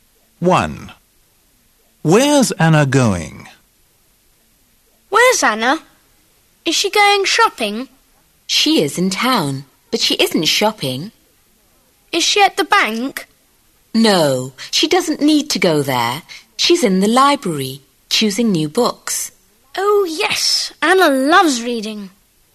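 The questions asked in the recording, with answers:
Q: Where's Anna going?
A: the library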